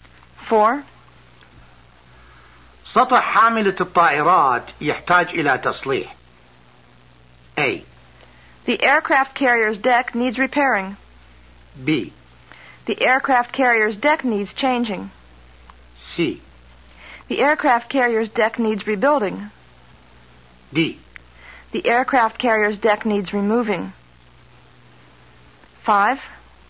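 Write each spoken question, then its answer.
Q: سطح حاملة الطائرات يحتاج إلى تصليح.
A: A: The aircraft carrier's deck needs repairing.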